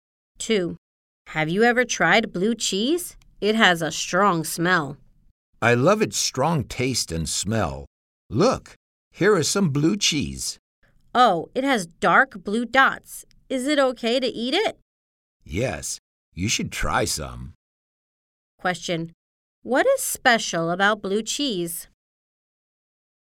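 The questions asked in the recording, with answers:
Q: What is special about blue cheese?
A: It has a strong smell and taste, with dark blue dots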